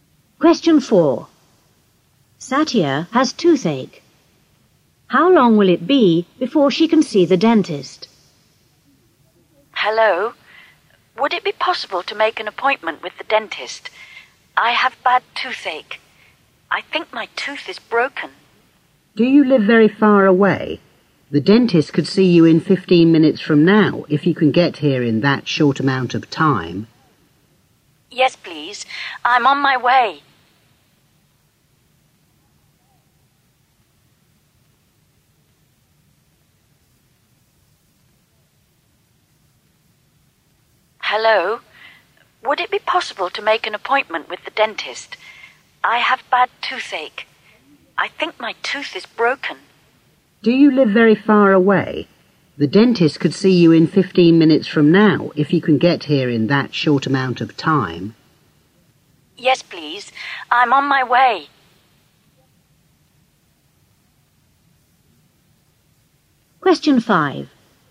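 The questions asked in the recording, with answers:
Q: How long will it be before she can see the dentist?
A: 15 minutes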